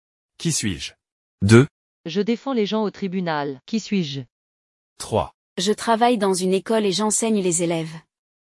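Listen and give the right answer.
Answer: avocat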